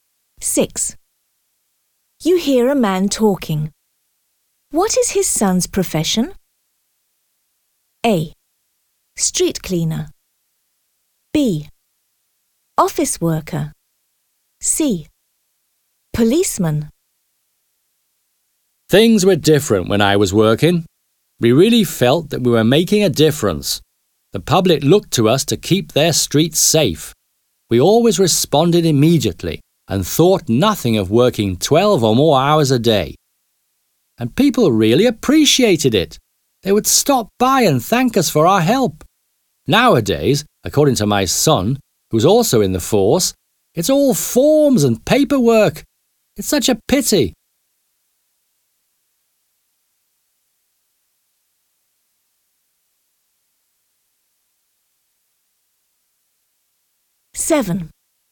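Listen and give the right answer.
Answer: C: Policeman.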